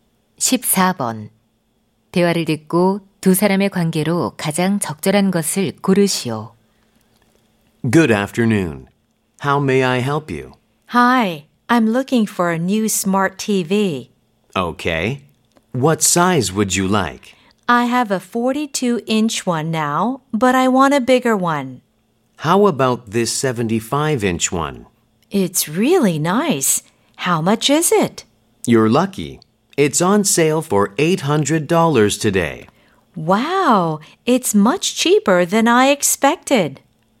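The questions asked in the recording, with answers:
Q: 대화를 듣고 두 사람의 관계로 가장 적절한 것을 고르시오.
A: 점원 - 손님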